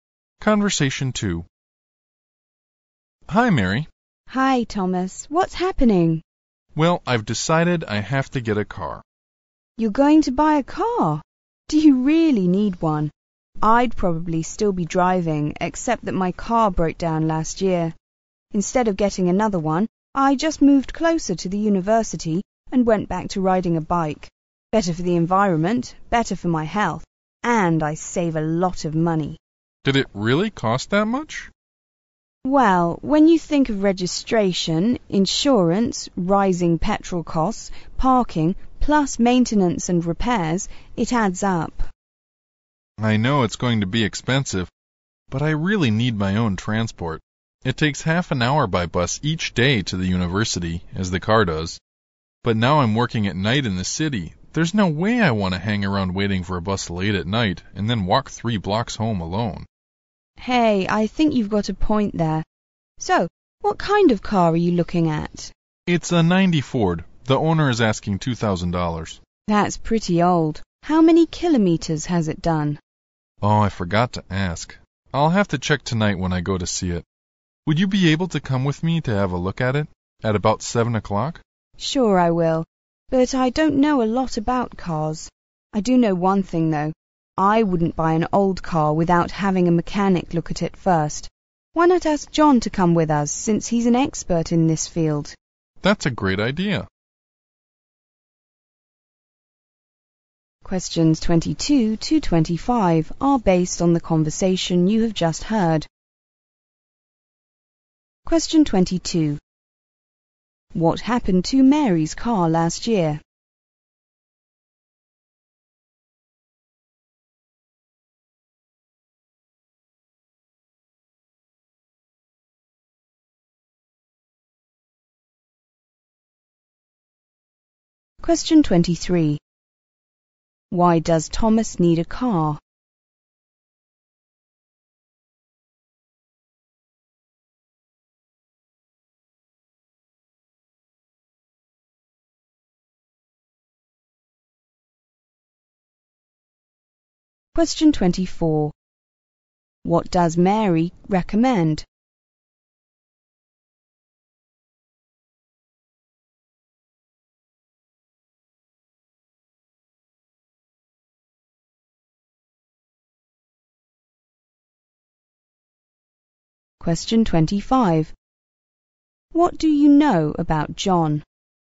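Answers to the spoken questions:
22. It broke down
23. He works at night in the city and doesn't want to wait for a bus and walk home alone late at night
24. Having a mechanic (John) check the car before buying it
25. He is an expert on cars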